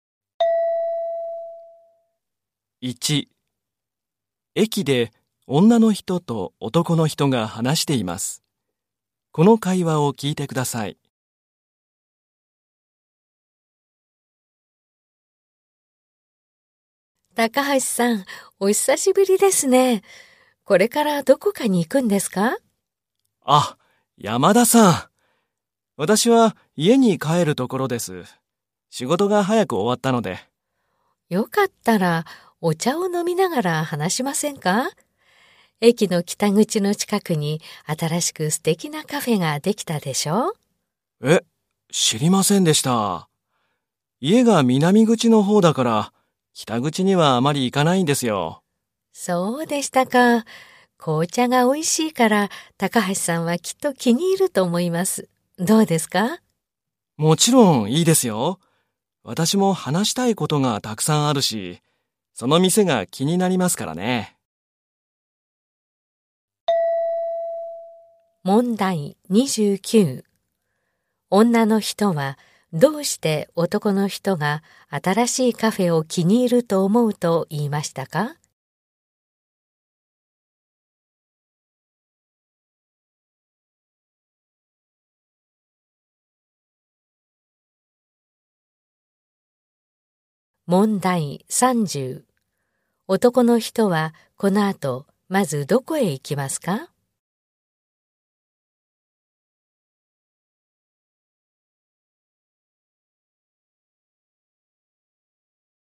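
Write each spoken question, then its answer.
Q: 女の人はどうして男の人が新しいカフェを気に入ると思うと言いましたか?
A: 紅茶が美味しいから

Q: 男の人はこの後まずどこへ行きますか?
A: 駅の北口近くの新しいカフェ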